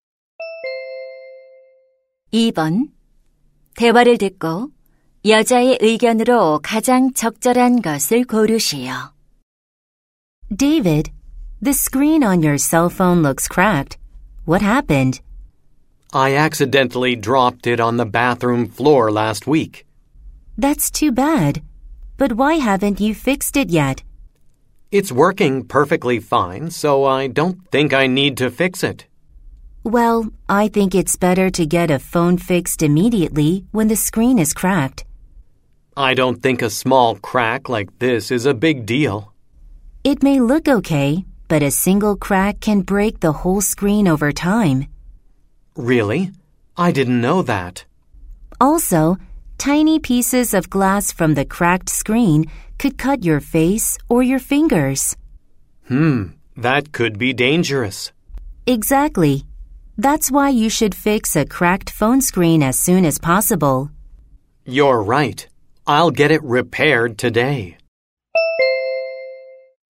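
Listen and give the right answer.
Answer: 금이 간 휴대폰 화면은 즉시 수리하는 것이 좋다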